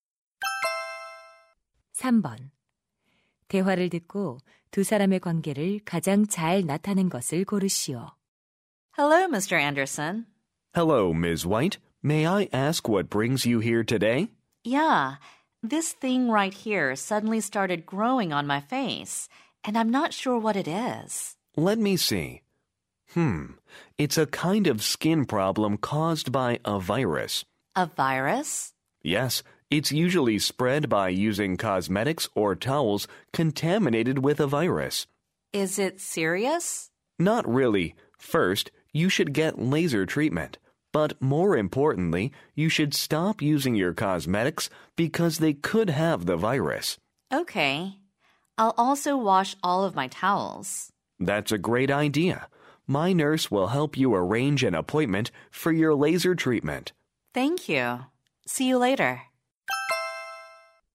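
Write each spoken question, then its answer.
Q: 대화를 듣고 두 사람의 관계를 가장 잘 나타낸 것을 고르시오.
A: 피부과 의사 – 환자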